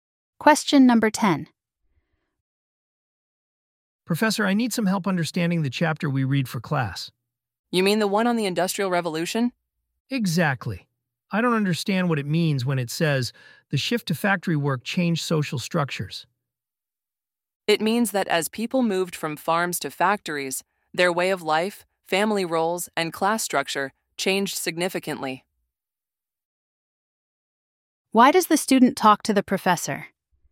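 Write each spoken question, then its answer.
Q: Why does the student talk to the professor?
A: To get help understanding a chapter on the Industrial Revolution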